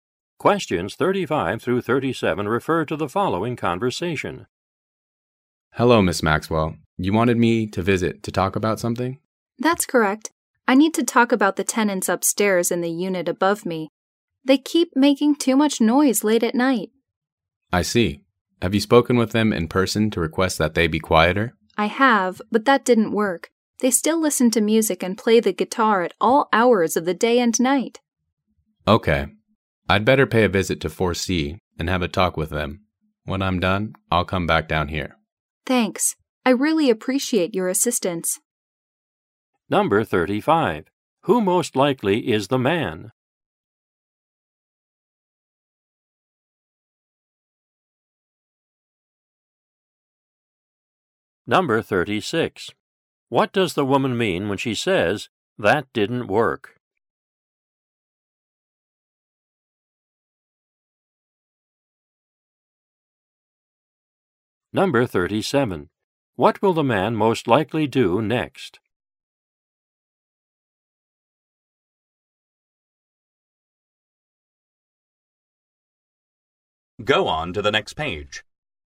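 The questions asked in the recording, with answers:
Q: What does the woman mean when she says, "That didn't work"?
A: The tenants are still noisy after she asked them

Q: What will the man most likely do next?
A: Visit unit 4C to talk with the tenants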